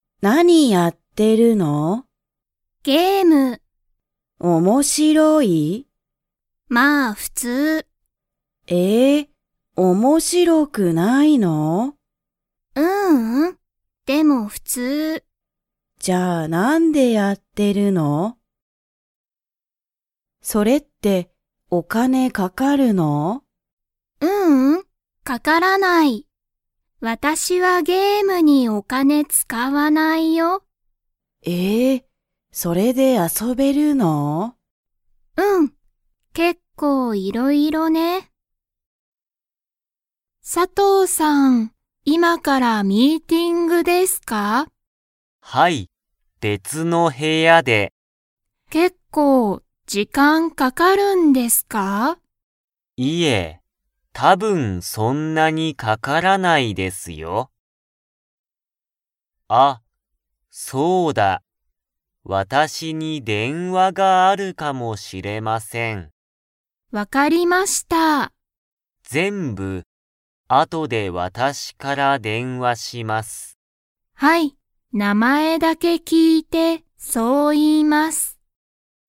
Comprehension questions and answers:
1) ハルは___をやっている。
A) 勉強(べんきょう)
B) 仕事(しごと)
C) メール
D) ゲーム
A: ゲーム

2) ハルはゲームにお金(かね)を使(つか)いますか?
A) はい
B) いいえ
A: いいえ

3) 佐藤(さとう)さんは、____でミーティングがある。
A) 下(した)の部屋(へや)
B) 別べつの部屋(へや)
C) 上(うえ)の部屋(へや)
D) この部屋(へや)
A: 別べつの部屋(へや)

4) 佐藤(さとう)さんは、電話(でんわ)があるかもしれない、と言(い)いましたか?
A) はい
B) いいえ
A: はい

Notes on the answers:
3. Sato-san is heading to the meeting in another room from now.

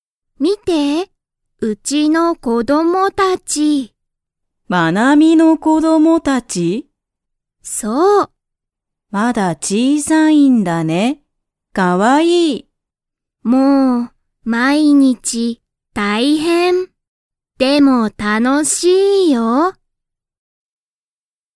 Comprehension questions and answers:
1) マナミの子供(こども)たちは、大(おお)きいですか?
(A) はい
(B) いいえ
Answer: いいえ

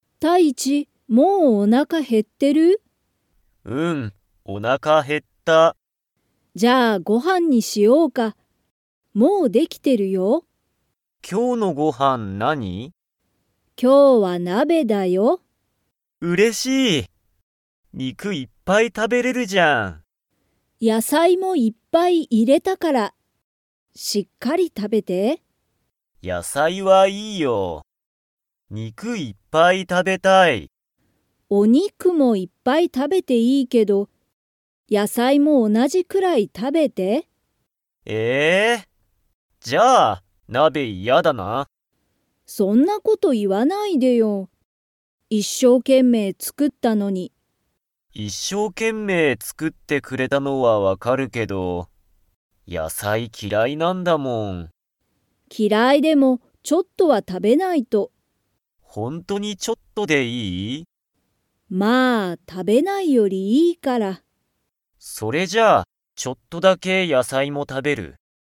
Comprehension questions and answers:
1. たいちはおなかが減へっていますか?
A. はい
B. いいえ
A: はい

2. たいちは が嫌きらい。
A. お肉にく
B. 野菜やさい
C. 勉強べんきょう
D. 運動うんどう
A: 野菜やさい

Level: Level 4

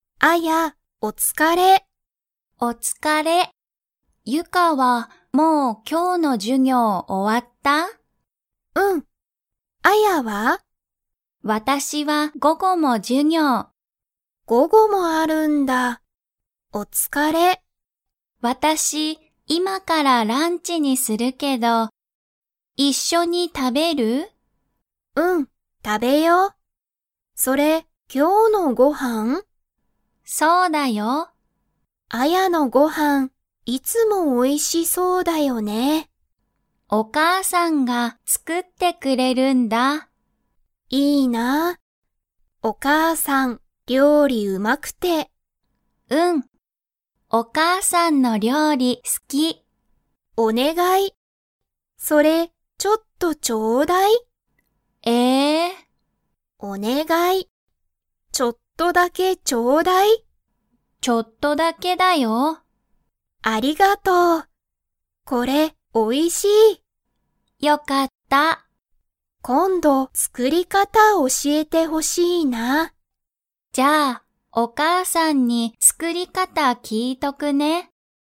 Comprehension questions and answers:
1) アヤは午後ごごも授業じゅぎょうがありますか?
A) はい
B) いいえ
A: はい

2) アヤのご飯はんは、 が作つくっている。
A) サヤカ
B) 彼氏かれし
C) お母かあさん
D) 息子むすこ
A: お母かあさん

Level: Level 3

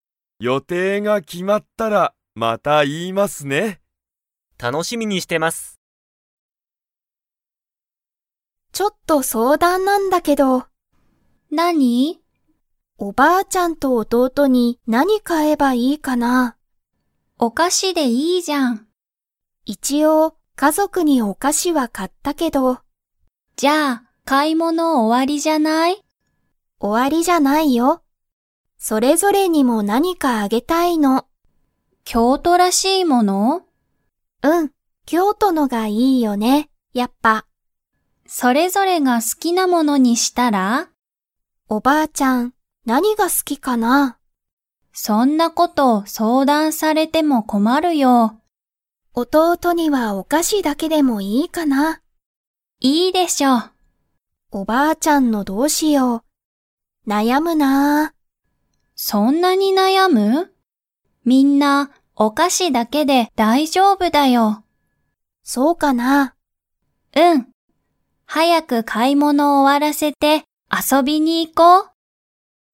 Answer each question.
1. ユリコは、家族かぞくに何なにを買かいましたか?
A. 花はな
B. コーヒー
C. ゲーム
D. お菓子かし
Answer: お菓子かし

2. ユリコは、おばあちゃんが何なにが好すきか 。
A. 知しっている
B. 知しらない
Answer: 知しらない

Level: Level 4

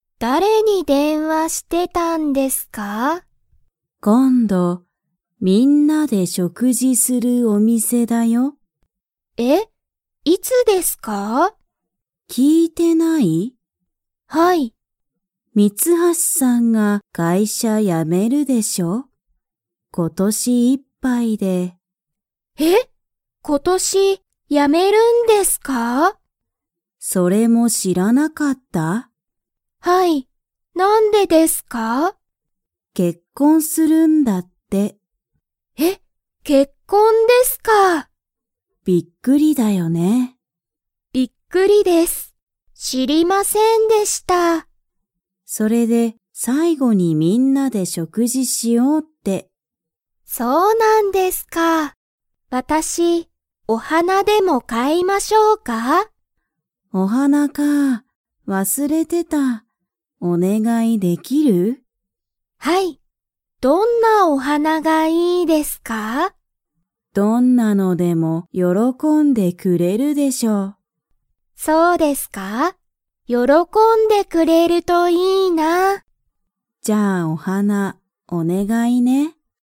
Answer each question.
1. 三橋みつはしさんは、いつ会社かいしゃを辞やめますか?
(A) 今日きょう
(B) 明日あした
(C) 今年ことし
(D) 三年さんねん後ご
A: 今年ことし

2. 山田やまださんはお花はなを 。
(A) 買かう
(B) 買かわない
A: 買かう

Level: Level 3

